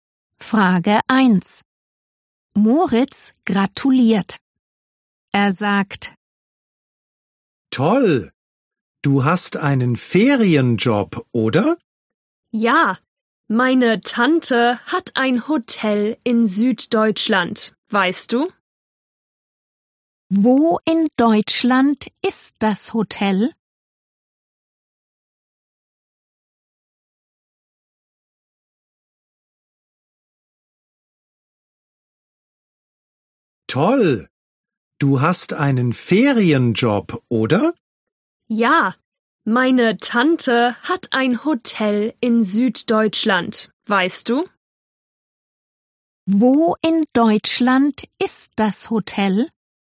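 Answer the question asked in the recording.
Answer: In Süddeutschland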